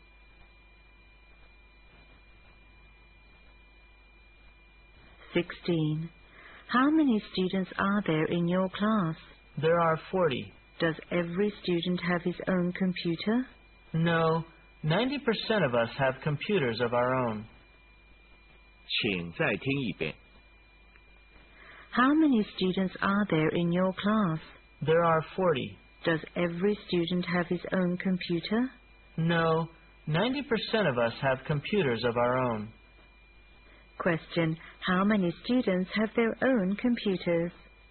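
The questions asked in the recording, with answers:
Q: Question. How many students have their own computers?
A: 36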